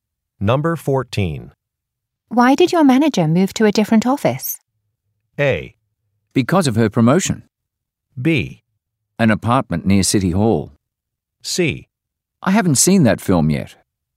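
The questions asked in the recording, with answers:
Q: Why did your manager move to a different office?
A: A: Because of her promotion.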